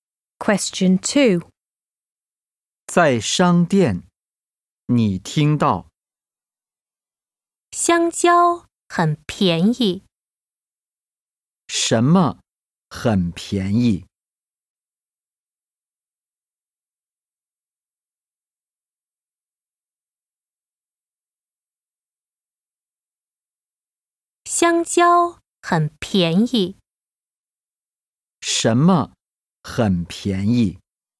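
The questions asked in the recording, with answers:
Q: 什么很便宜?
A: 香蕉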